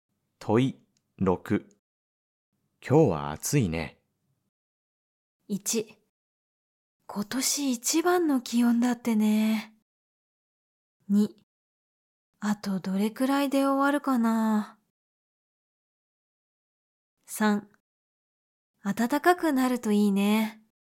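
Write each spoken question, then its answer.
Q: 今日は暑いね。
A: 1: 今年一番の気温だってね。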